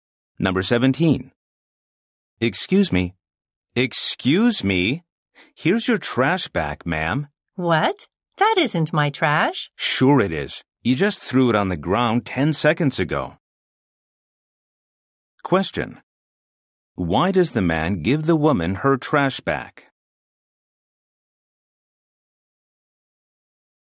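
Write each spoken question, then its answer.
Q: Why does the man give the woman her trash back?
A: She threw it on the ground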